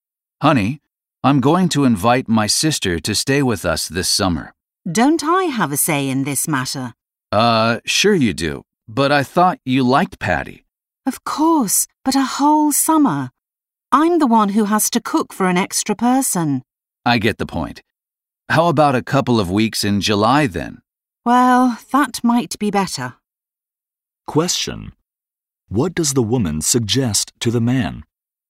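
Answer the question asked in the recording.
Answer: That her sister stay with them for a couple of weeks in July instead of the whole summer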